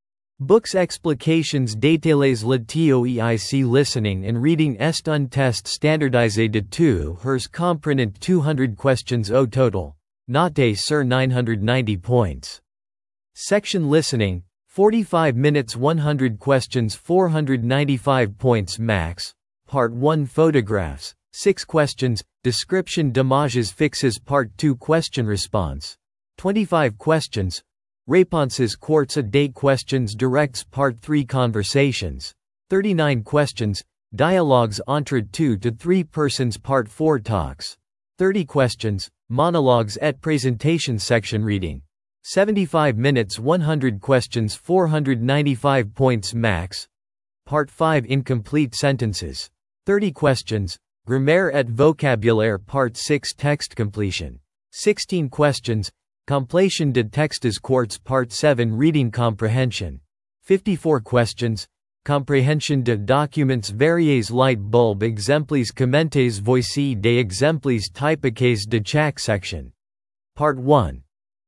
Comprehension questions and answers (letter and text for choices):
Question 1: Combien de temps dure la section Listening du TOEIC ?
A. 30 minutes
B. 45 minutes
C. 60 minutes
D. 75 minutes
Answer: B. 45 minutes

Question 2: Quel est le score maximum possible au TOEIC L&R ?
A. 900 points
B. 950 points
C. 990 points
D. 1000 points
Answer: C. 990 points

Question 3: Combien de questions contient la Part 2 - Question-Response ?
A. 20 questions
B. 25 questions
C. 30 questions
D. 35 questions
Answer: B. 25 questions

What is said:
📚 Explications détaillées
Le TOEIC Listening & Reading est un test standardisé de 2 heures comprenant 200 questions au total, noté sur 990 points.
Section Listening (45 minutes - 100 questions - 495 points max) :
Part 1 - Photographs (6 questions) : Description d'images fixes
Part 2 - Question-Response (25 questions) : Réponses courtes à des questions directes
Part 3 - Conversations (39 questions) : Dialogues entre 2-3 personnes
Part 4 - Talks (30 questions) : Monologues et présentations
Part 5 - Incomplete Sentences (30 questions) : Grammaire et vocabulaire
Part 6 - Text Completion (16 questions) : Complétion de textes courts
Part 7 - Reading Comprehension (54 questions) : Compréhension de documents variés
Voici des exemples typiques de chaque section :